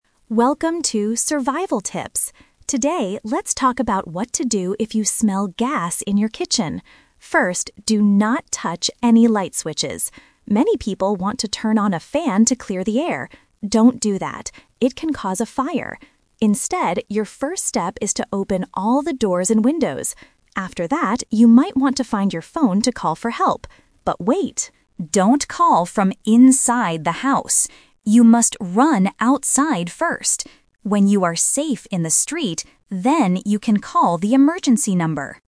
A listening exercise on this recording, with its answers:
Listen to a podcast about survival tips. Choose the correct answer (A, B, or C).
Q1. What does the podcaster say you should NEVER do when you smell gas?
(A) Open the doors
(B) Turn on a fan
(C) Run outside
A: Turn on a fan

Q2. What is the first safe thing you should do?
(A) Open the windows.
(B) Call the emergency number.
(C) Turn off the lights.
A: Open the windows.

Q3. Where should you be when you call for help?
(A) In the kitchen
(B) Near the window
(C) Outside in the street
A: Outside in the street

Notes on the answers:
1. Trap (The Twist): Option A and C are distractors. They are things you should do, not things you should never do.
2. The podcaster tells you the correct first action: "Instead, your first step is to open all the doors and windows." Trap: Option B is a trap because you shouldn't call for help immediately (you must run outside first). Option C is a distractor because the audio says "do not touch any light switches," it doesn't say to turn them off (which can also cause a spark).
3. The podcaster explains when it is safe to call: "When you are safe in the street, then you can call the emergency number." Trap (The Twist): Option A (In the kitchen) is the trap. You might want to find your phone and call inside the house, but the podcaster explicitly says, "Don't call from inside the house."

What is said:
Podcaster: Welcome to 'Survival Tips'! Today, let's talk about what to do if you smell gas in your kitchen. First, do not touch any light switches. Many people want to turn on a fan to clear the air. Don't do that! It can cause a fire. Instead, your first step is to open all the doors and windows. After that, you might want to find your phone to call for help. But wait! Don't call from inside the house. You must run outside first.

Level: A2

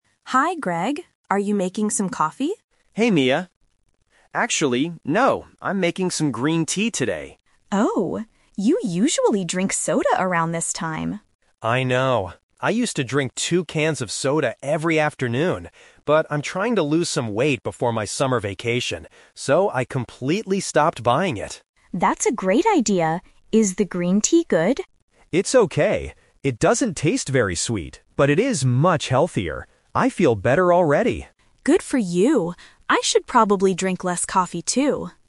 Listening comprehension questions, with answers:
Listen to the conversation between two colleagues and choose the correct answer (A, B, or C) for each question.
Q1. What is Greg making to drink right now?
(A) Coffee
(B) Green tea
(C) Soda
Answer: Green tea

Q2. Why did Greg stop drinking soda?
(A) Because he wants to lose weight.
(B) Because it is too expensive.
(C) Because he doesn't like sweet drinks anymore.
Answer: Because he wants to lose weight.

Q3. What does Mia think about her own habits at the end of the conversation?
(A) She needs to lose weight.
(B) She wants to start drinking soda.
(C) She should drink less coffee.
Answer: She should drink less coffee.

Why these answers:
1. Greg clearly says, "I'm making some green tea today." Option (A) is a trap; Mia asks if he is making coffee, but he says no. Option (C) is also a trap; soda is what he used to drink in the afternoon.
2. Greg explains his reason: "But I'm trying to lose some weight before my summer vacation." Option (B) is a logical reason to stop buying something, but it is never mentioned. Option (C) is a trap; he says green tea is not very sweet, but he doesn't say he dislikes sweet things.
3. In her last line, Mia says, "I should probably drink less coffee, too." Option (A) is a trap; Greg is the one who wants to lose weight, not Mia. Option (B) is not mentioned in the audio.

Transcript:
Mia: Hi Greg. Are you making some coffee?
Greg: Hey Mia. Actually, no. I'm making some green tea today.
Mia: Oh? You usually drink soda around this time.
Greg: I know. I used to drink two cans of soda every afternoon. But I'm trying to lose some weight before my summer vacation. So, I completely stopped buying it.
Mia: That's a great idea. Is the green tea good?
Greg: It's okay. It doesn't taste very sweet, but it is much healthier. I feel better already.

